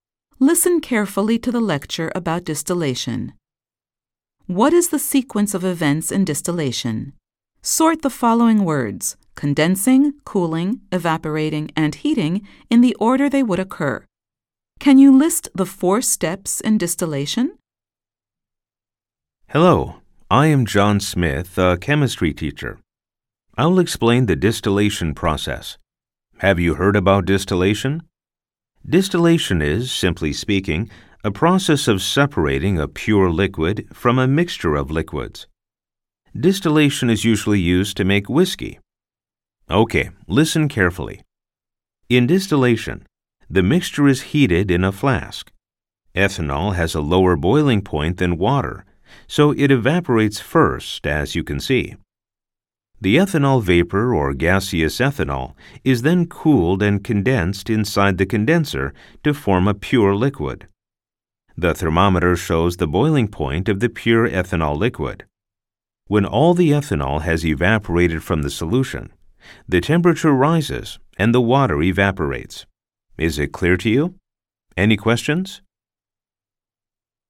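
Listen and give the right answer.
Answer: heating, evaporating, cooling, condensing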